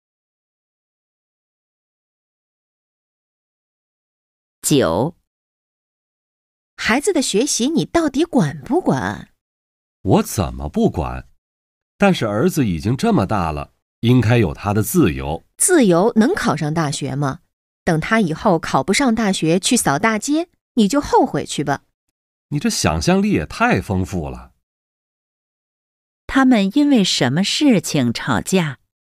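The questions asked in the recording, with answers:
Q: 他们因为什么事情吵架?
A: 孩子的学习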